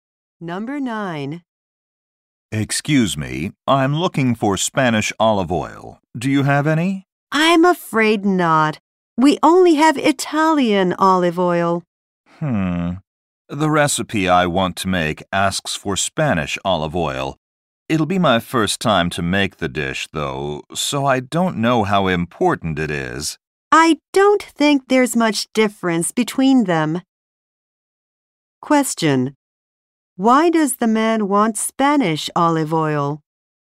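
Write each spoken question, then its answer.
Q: Why does the man want Spanish olive oil?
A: His recipe asks for it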